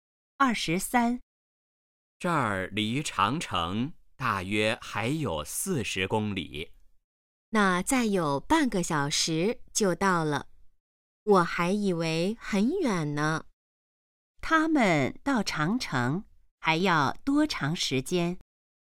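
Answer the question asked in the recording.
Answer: 半个小时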